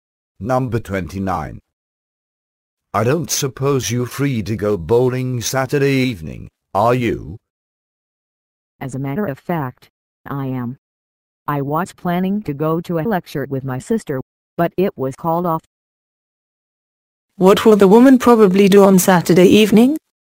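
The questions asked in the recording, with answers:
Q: What will the woman probably do on Saturday evening?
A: Go bowling.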